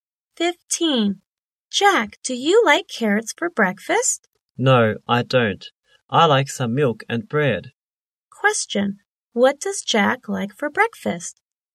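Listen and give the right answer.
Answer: Milk and bread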